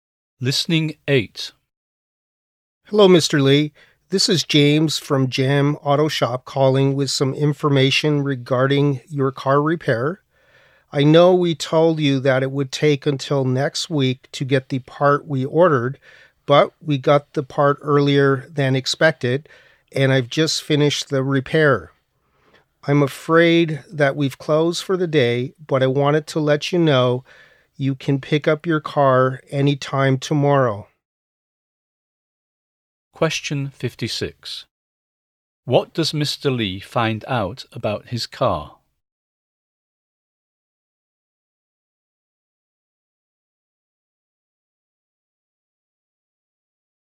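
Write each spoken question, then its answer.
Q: What does Mr. Lee find out about his car?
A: The repair is finished early and he can pick it up tomorrow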